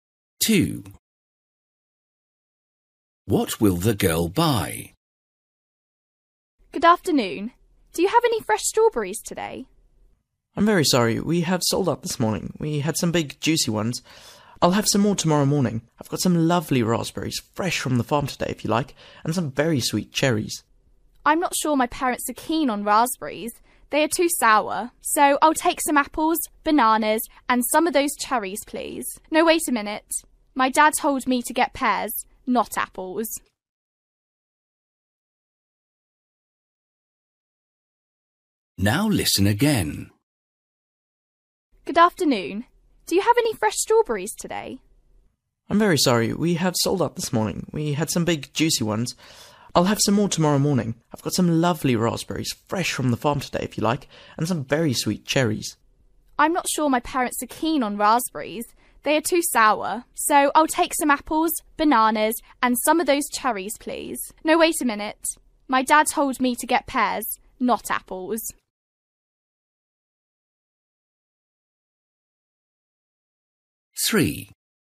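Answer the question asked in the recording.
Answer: Bananas, cherries and pears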